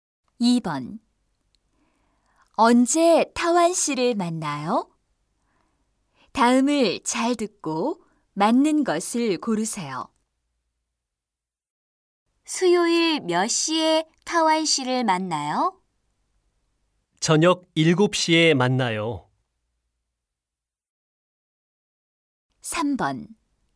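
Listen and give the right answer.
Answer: 수요일 저녁 7시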